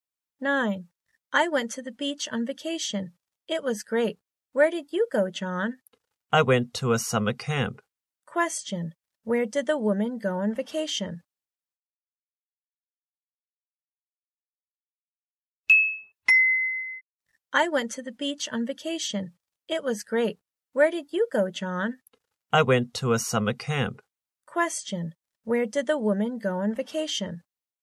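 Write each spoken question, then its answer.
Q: Where did the woman go on vacation?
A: To the beach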